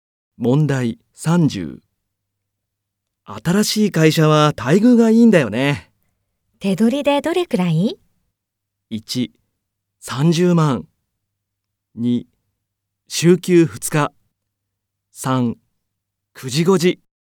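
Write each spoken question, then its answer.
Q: 手取りでどれくらい?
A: 1: 30万。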